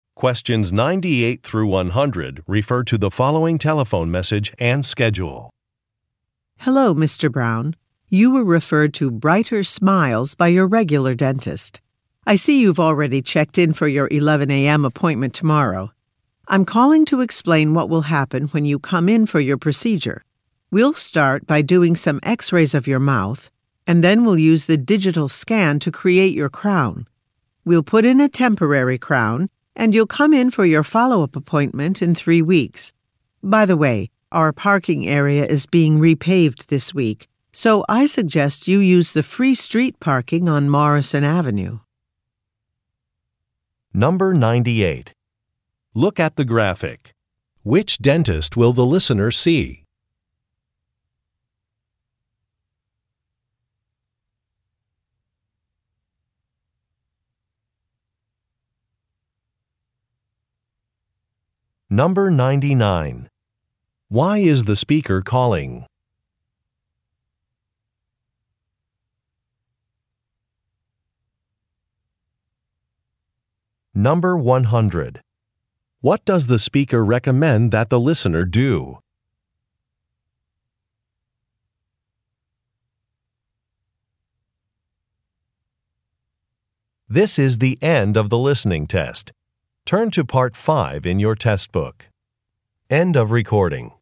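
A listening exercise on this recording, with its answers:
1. Why is the speaker calling?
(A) To explain a procedure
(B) To reschedule an appointment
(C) To ask about a payment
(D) To confirm insurance information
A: To explain a procedure

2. What does the speaker recommend that the listener do?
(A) Review the dentist's instructions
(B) Park on the street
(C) Fill out some paperwork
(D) Use a different credit card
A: Park on the street

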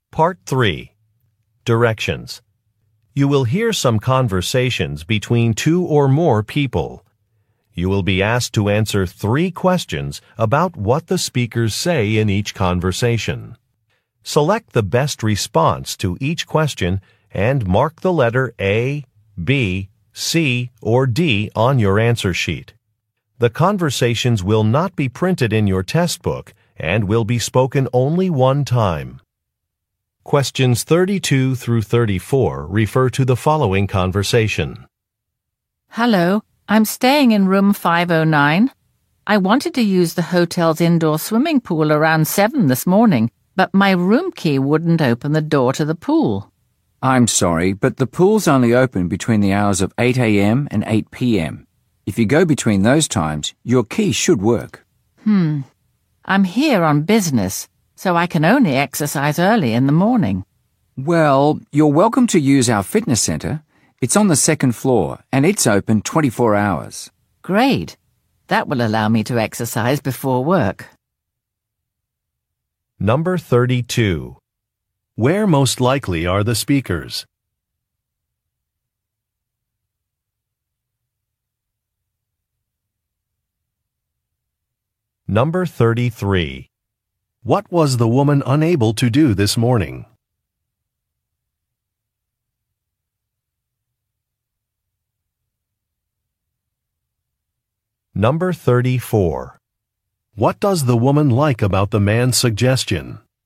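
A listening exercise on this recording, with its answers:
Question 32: Where most likely are the speakers?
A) At an airport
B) At an office building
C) At a shopping center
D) At a hotel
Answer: At a hotel

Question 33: What was the woman unable to do this morning?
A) Open a door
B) Make photocopies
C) Find a taxi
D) Process a payment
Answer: Open a door

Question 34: What does the woman like about the man's suggestion?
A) It accommodates her schedule.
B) It is affordable.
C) It will help increase sales.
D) It will reduce commuting time.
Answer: It accommodates her schedule.

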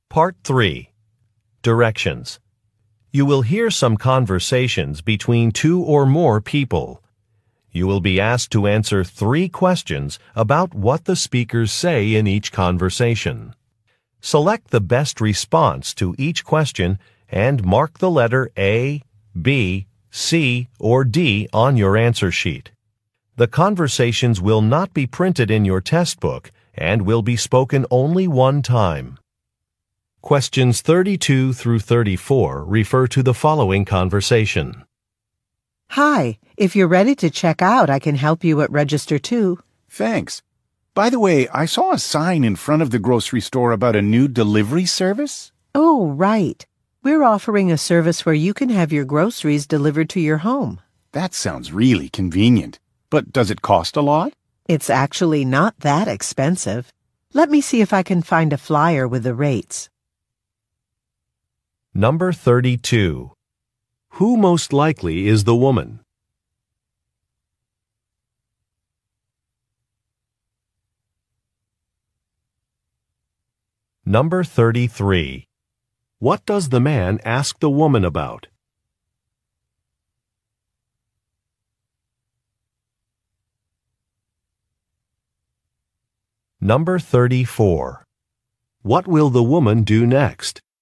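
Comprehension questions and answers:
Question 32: Who most likely is the woman?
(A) A store cashier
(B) A tour guide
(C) A restaurant server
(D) A truck driver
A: A store cashier

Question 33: What does the man ask the woman about?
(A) Membership rewards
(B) A delivery service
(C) An online payment system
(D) New business hours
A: A delivery service

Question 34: What will the woman do next?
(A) Call a supervisor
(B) Process a refund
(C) Give some directions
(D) Look for a price list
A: Look for a price list

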